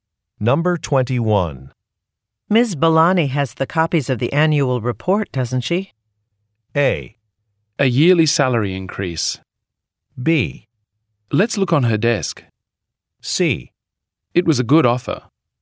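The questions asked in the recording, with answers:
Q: Ms. Balani has the copies of the annual report, doesn't she?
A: B: Let's look on her desk.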